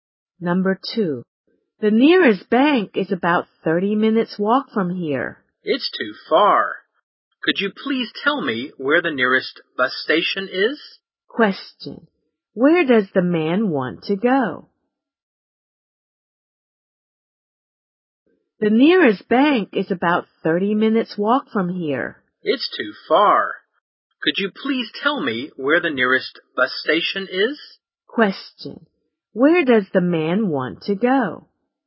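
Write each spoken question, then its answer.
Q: where does the man want to go?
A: The nearest bus station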